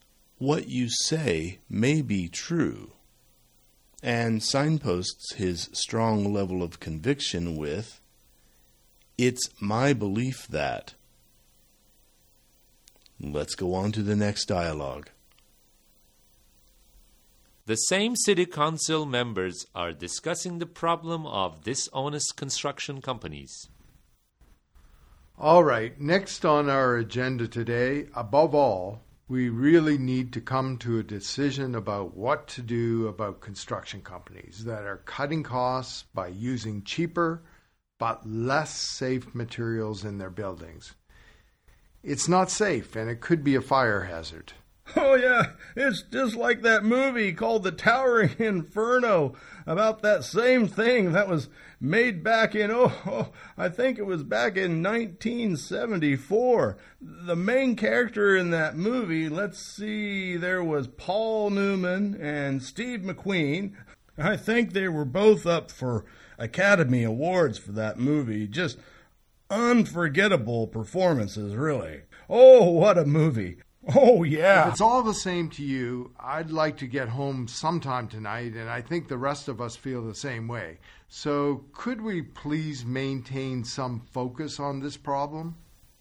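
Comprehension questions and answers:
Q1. [Speaker 1]: Alright, next on our agenda today, _______, we really need to come to a decision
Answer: above all

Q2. So, _______ on this problem?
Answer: could we please maintain some focus

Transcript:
But the first speaker only wants to draw attention to what she thinks is the more central issue, and she does this with–and there's that phrase again. Did you catch those, listeners?– Not everyone will agree with me, but and later . the real question is . Notice also how he shows consideration for what others have said by using the phrase, What you say may be true, and signposts his strong level of conviction with . It's my belief that. Let's go on to the next dialogue.
[The same City Council members are discussing the problem of dishonest construction companies.]
It's not safe and could be a fire hazard.
[Speaker 2]: Oh yeah, it's just like that movie called the Towering Inferno about that same thing that was made back in, oh I think it was back in 1974. 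The main character in that movie, let's see, there was Paul Newman and Steve McQueen? I think they were both up for Academy Awards for that movie—just UNFORGETTABLE performances, really. Oh what a movie! Oh yeah–[Speaker 1]: If it's all the same to you I'd like to get home sometime tonight, and I think the rest of us feel the same.
David: Listeners, what did you hear? You should have noticed the use, again, of above all, near the beginning, and later you should have heard maintain some focus and stick to the point.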